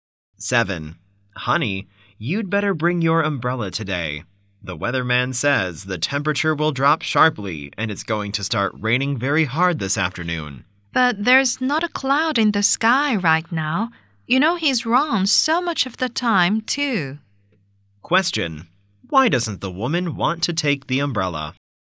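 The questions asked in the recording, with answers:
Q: Why doesn't the woman want to take the umbrella?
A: There are no clouds and the weatherman is often wrong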